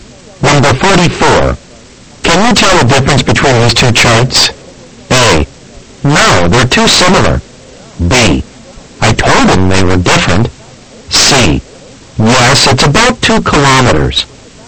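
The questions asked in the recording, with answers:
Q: Can you tell the difference between these two charts?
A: A: No, they're too similar.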